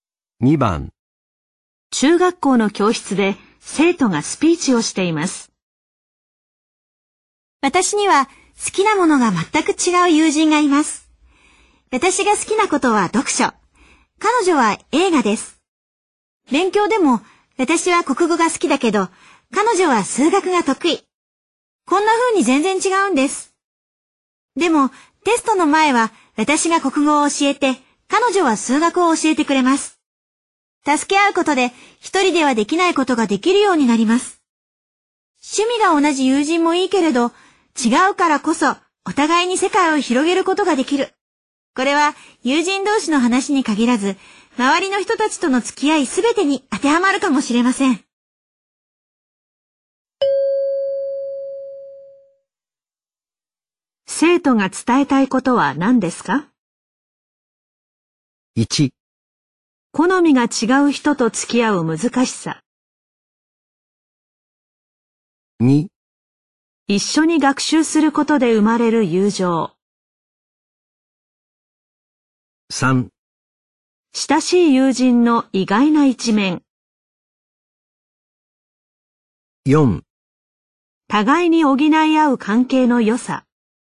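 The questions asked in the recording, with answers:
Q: 生徒が伝えたいことは何ですか?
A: 4: 互いに補い合う関係の良さ。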